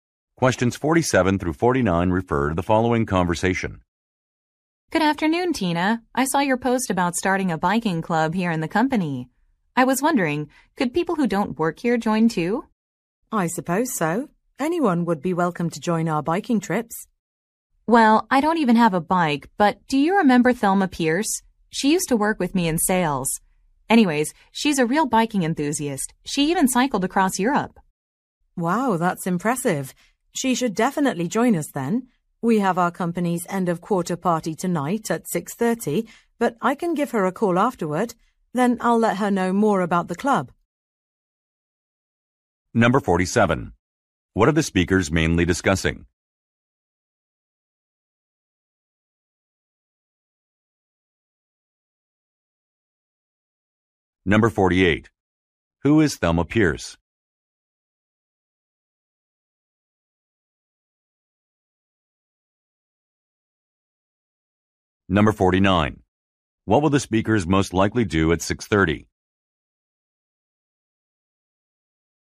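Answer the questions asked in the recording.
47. A biking club
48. A former coworker in sales
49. Attend a company end-of-quarter party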